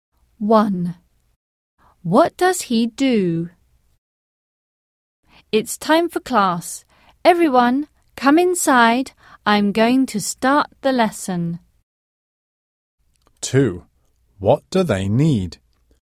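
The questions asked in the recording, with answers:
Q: What does he do?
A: He is a teacher.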